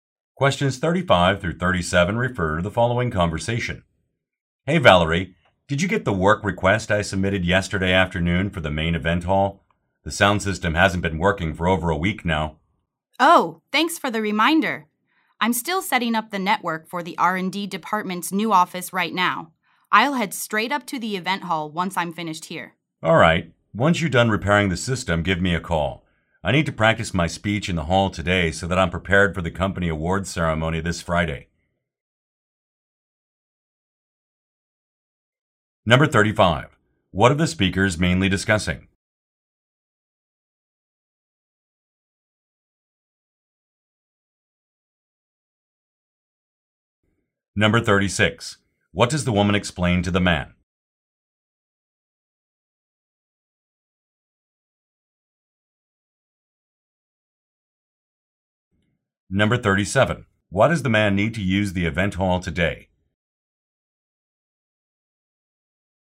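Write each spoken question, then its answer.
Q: What are the speakers mainly discussing?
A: A repair request for the event hall's broken sound system

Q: What does the woman explain to the man?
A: She is still setting up the network for the R&D department's new office

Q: Why does the man need to use the event hall today?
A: To practice his speech for the awards ceremony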